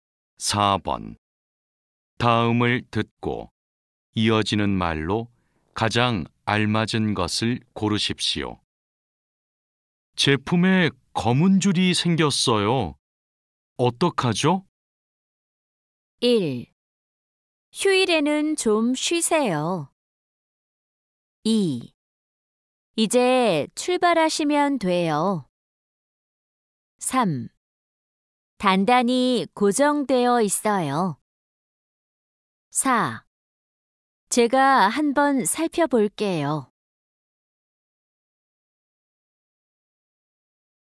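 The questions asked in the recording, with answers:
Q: 제품에 검은 줄이 생겼어요. 어떡하죠?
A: 4: 제가 한번 살펴볼게요.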